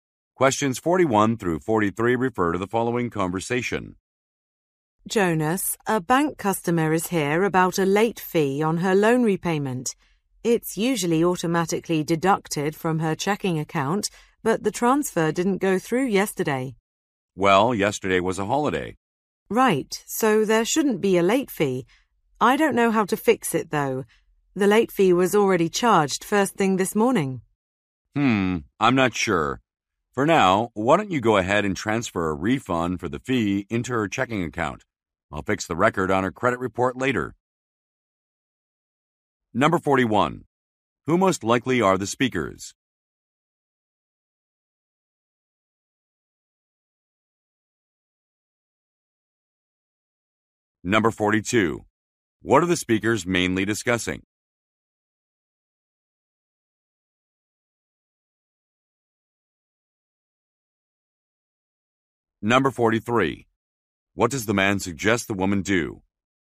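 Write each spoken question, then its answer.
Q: Who most likely are the speakers?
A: Bank employees

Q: What are the speakers mainly discussing?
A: A late fee charged on a customer's loan repayment

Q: What does the man suggest the woman do?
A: Transfer a refund for the fee into the customer's checking account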